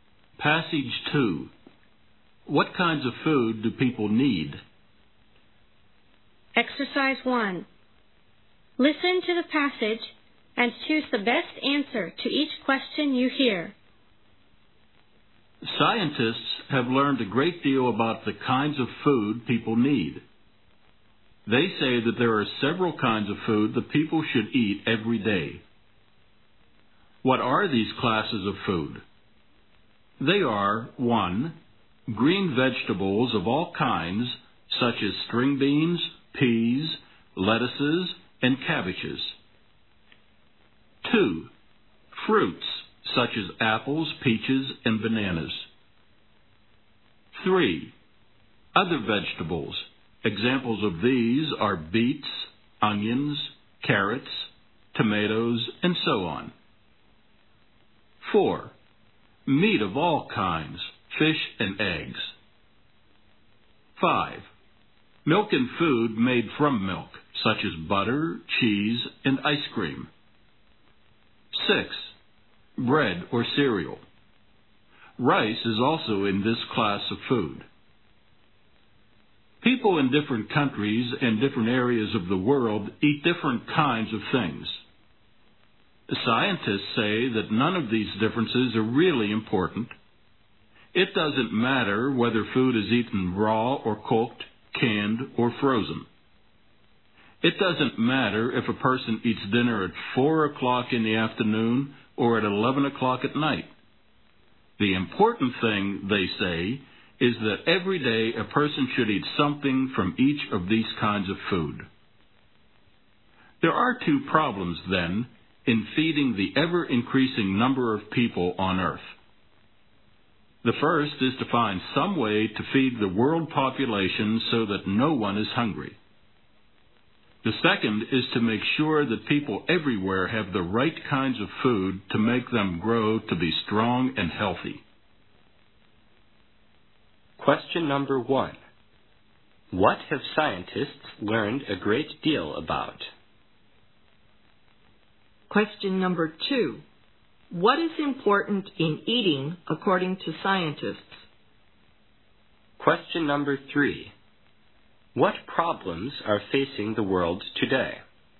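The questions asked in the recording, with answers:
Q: What have scientists learned a great deal about?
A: The kinds of food people need.

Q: What is important in eating according to scientists?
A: Eating something from each kind of food every day.

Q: What problems are facing the world today?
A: Feeding everyone so no one is hungry, and giving everyone the right kinds of food.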